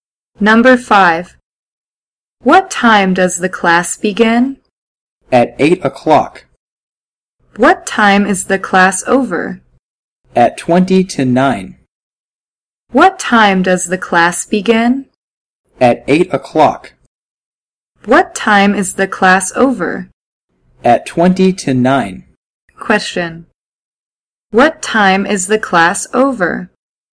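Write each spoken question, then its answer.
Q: What time is the class over?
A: At 8:40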